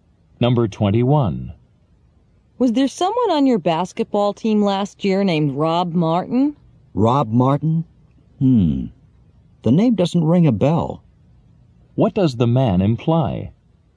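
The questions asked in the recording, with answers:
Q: What does the man imply?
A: He doesn't remember anyone named Rob Martin.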